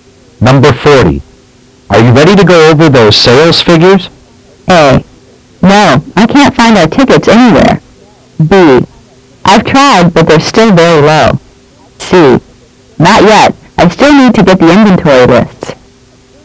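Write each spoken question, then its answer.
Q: Are you ready to go over those sales figures?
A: C: Not yet. I still need to get the inventory lists.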